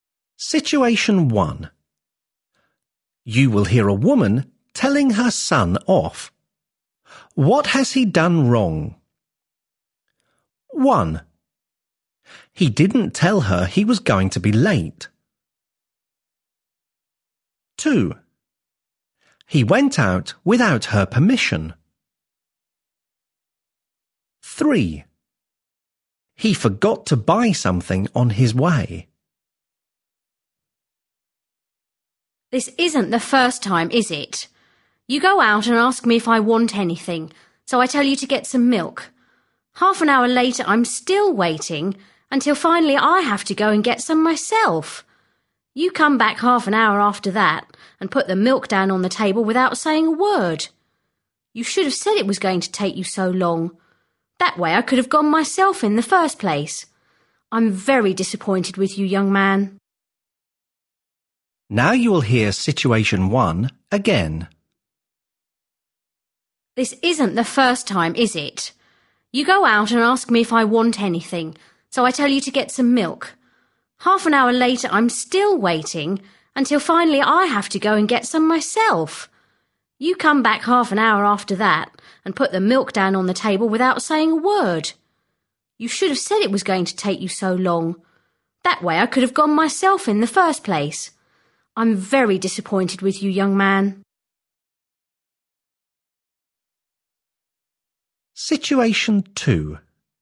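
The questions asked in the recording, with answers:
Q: What has he done wrong?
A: 1: He didn't tell her he was going to be late.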